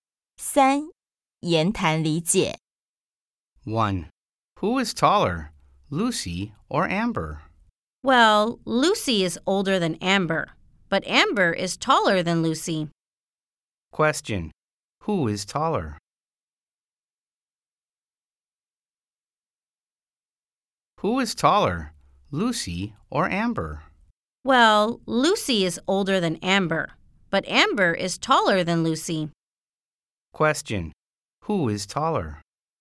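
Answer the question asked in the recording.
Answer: Amber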